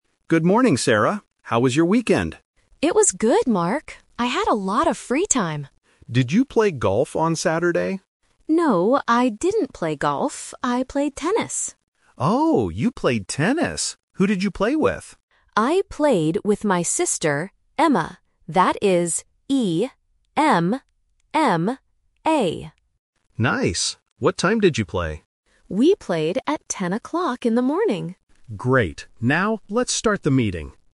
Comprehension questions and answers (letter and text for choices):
Listen to two colleagues talking before a meeting. Choose the correct answer (A, B, or C) for each question.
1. What sport did Sarah play on the weekend?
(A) Golf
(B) Tennis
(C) Badminton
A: (B) Tennis

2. How do you spell the sister's name?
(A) E-M-M-A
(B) A-M-M-A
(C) E-N-N-A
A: (A) E-M-M-A

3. What time did Sarah play?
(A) 10:00 PM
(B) 2:00 PM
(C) 10:00 AM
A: (C) 10:00 AM

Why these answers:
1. Sarah says clearly, "I played tennis." Option (A) "Golf" is the trap; Mark asks if she played golf, but she explicitly says, "No, I didn't play golf." Option (C) "Badminton" is a popular sport but is never mentioned in the audio.
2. Sarah spells her sister's name as "E-M-M-A". Option (B) uses the letter 'A' instead of 'E' at the beginning, which tests the difference between English vowel sounds. Option (C) uses the letter 'N' instead of 'M'.
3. Sarah says they played at "ten o'clock in the morning", which means 10:00 AM. Option (A) "10:00 PM" is a trap because it is the correct number but the wrong time of day (PM means evening/night). Option (B) is not mentioned.